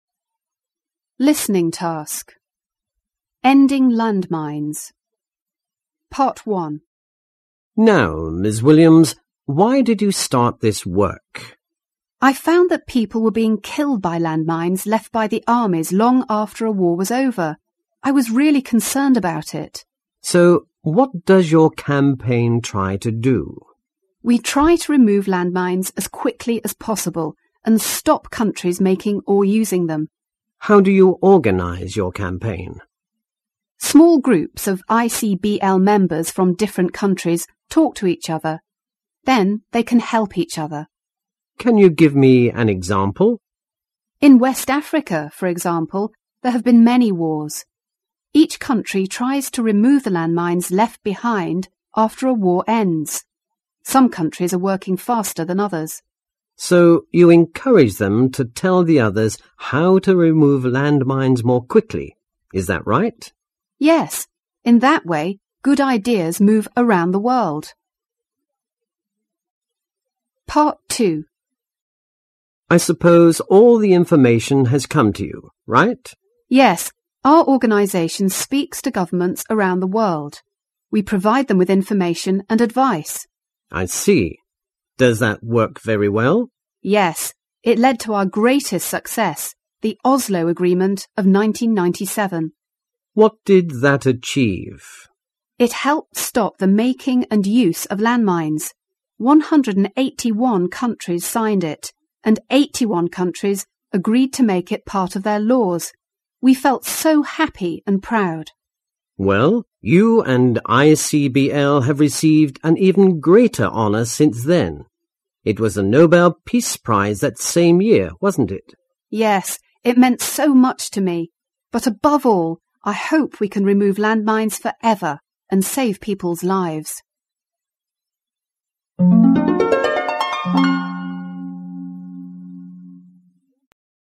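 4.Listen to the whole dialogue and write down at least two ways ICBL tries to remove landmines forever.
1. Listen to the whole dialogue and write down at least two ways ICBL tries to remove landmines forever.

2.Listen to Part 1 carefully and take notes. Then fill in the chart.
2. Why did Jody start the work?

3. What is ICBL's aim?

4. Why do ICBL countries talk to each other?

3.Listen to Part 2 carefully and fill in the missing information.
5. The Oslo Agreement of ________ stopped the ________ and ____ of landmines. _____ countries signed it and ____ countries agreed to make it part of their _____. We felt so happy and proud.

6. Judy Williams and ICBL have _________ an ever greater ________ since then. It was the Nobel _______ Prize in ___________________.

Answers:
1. Members from different countries share ideas on removing landmines faster; it gives governments information and advice (leading to the Oslo Agreement).
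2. People were being killed by landmines left by armies long after wars were over.
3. To remove landmines as quickly as possible and stop countries making or using them.
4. So they can help each other.
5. 1997; making; use; 181; 81; laws
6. received; honour; Peace; that same year (1997)

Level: 高中英语必修四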